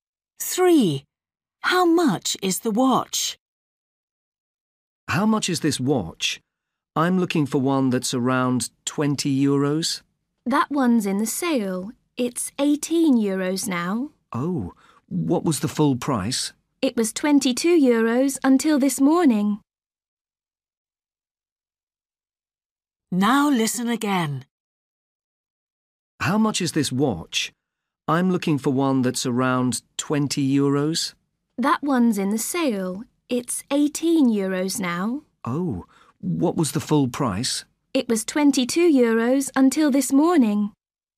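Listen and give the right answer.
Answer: 18 euros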